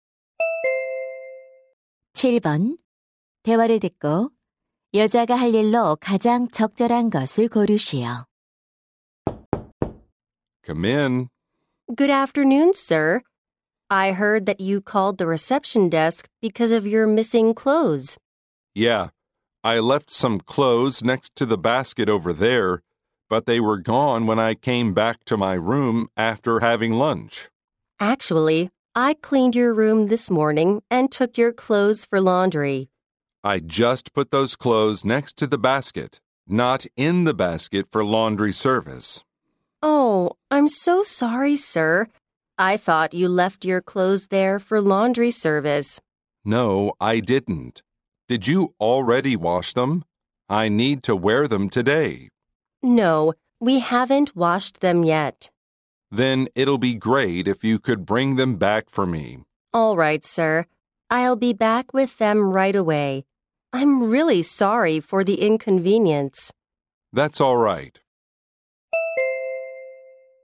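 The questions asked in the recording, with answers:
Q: 대화를 듣고 여자가 할 일로 가장 적절한 것을 고르시오.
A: 남자의 옷을 다시 가져다주기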